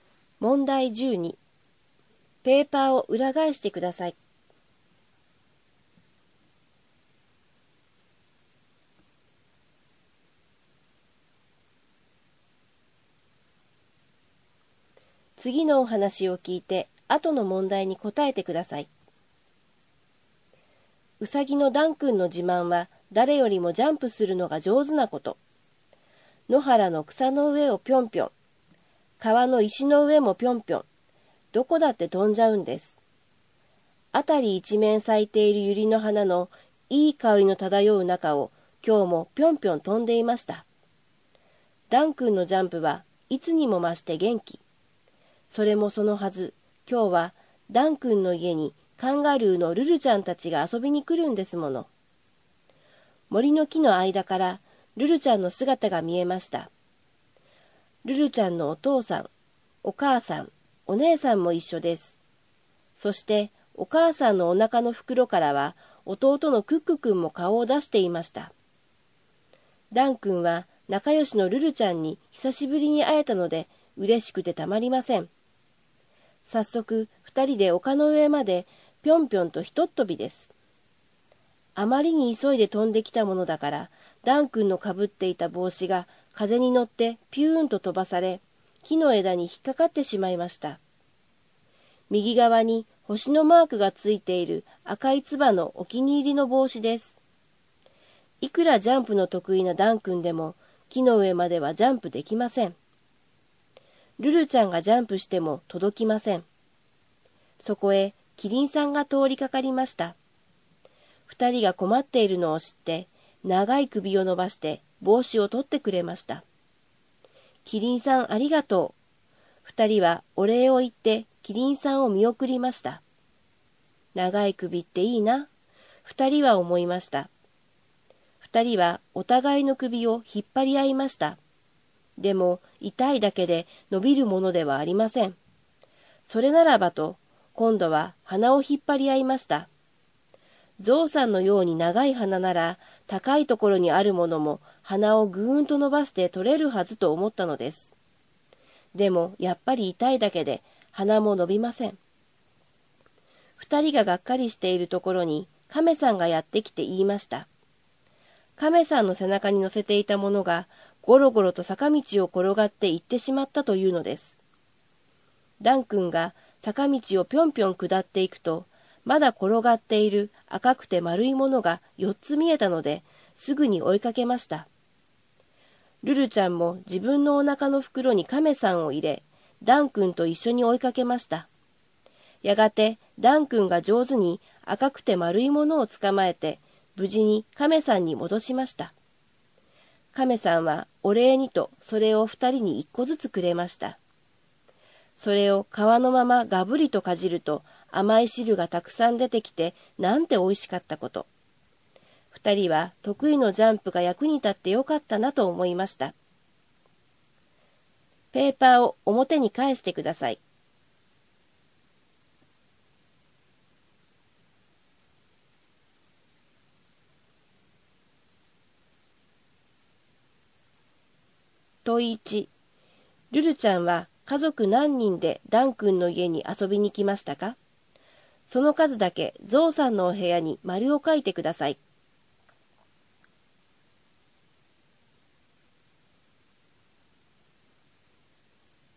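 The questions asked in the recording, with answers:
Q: ルルちゃんは家族何人でダン君の家に遊びに来ましたか?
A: 5人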